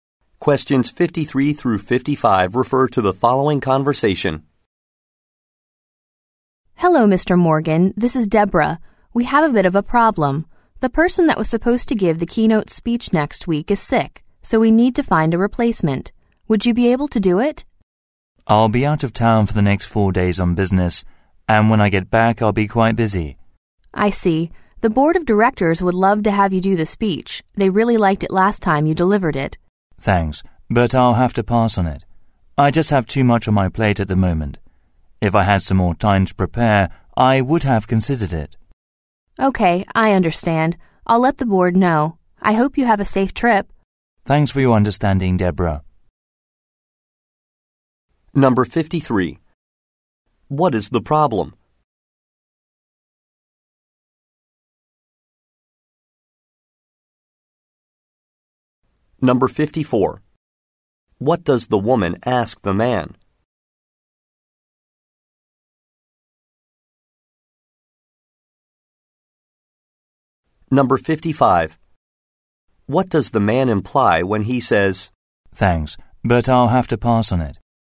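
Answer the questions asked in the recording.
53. The keynote speaker is sick and needs a replacement
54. To give the keynote speech
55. He is declining because he is too busy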